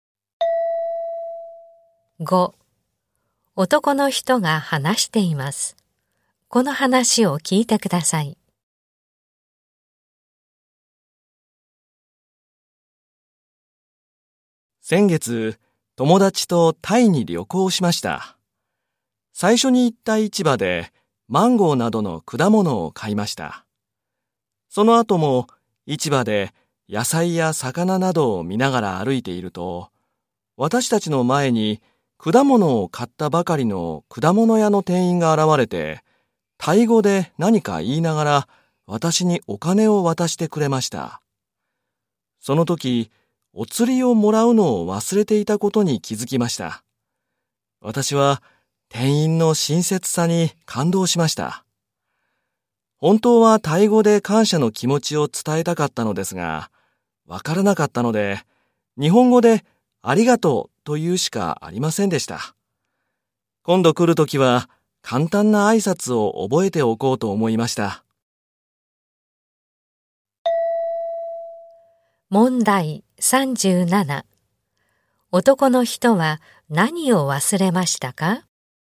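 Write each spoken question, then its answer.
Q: 男の人は何を忘れましたか?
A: お釣りをもらうこと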